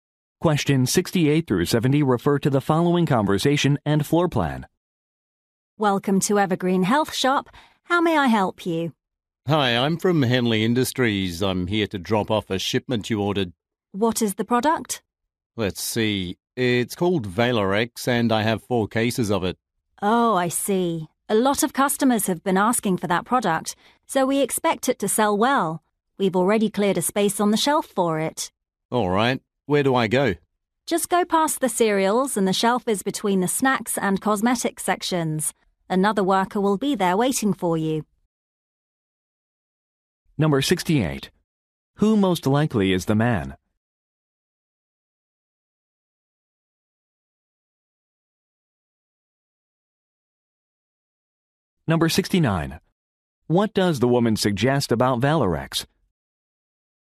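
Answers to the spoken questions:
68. A delivery person
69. It is expected to sell well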